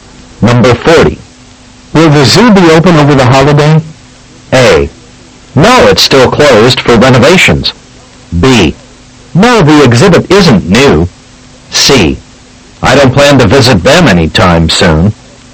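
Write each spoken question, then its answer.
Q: Will the zoo be open over the holiday?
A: A: No, it's still closed for renovations.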